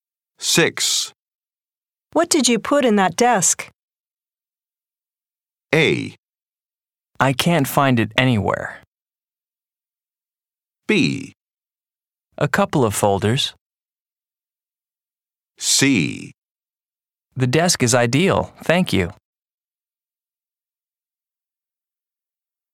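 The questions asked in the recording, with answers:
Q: What did you put in that desk?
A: B: A couple of folders.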